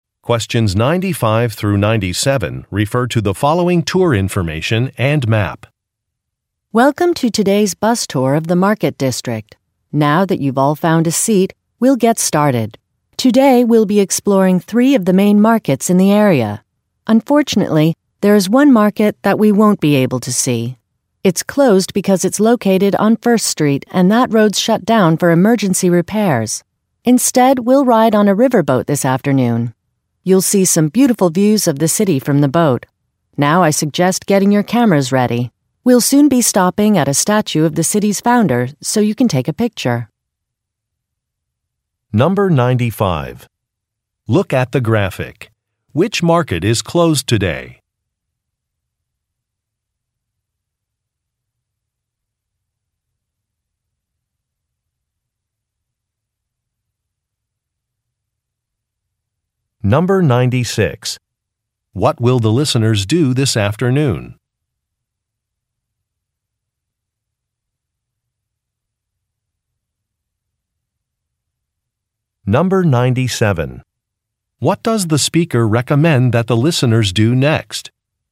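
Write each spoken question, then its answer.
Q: What will the listeners do this afternoon?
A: Ride on a riverboat

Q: What does the speaker recommend that the listeners do next?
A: Get their cameras ready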